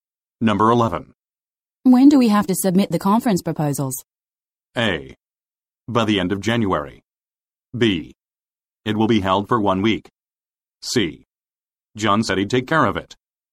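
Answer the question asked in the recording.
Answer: A: By the end of January.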